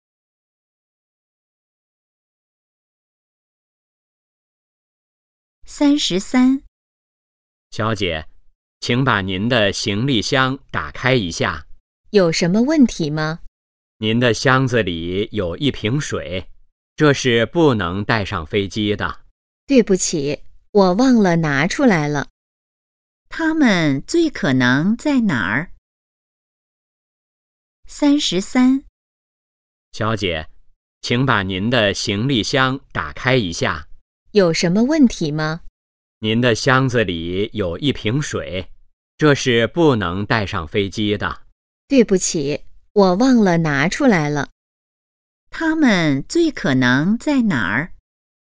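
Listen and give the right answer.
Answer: 机场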